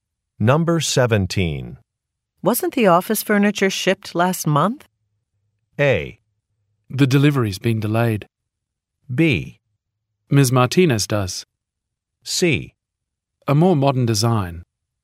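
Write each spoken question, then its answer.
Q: Wasn't the office furniture shipped last month?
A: A: The delivery's been delayed.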